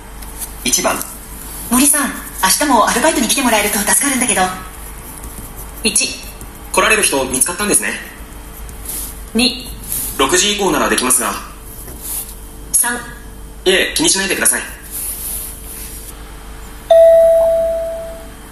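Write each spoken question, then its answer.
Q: 森さん、明日もアルバイトに来てもらえると助かるんだけど。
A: 2: 6時以降ならできますが。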